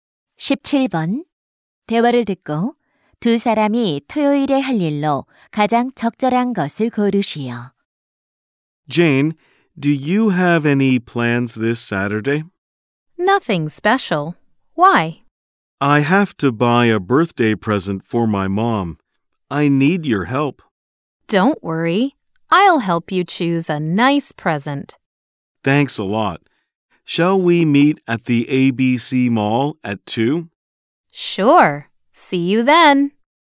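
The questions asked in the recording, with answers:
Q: 대화를 듣고 두 사람이 토요일에 할 일로 가장 적절한 것을 고르시오.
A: 엄마 생일 선물 사기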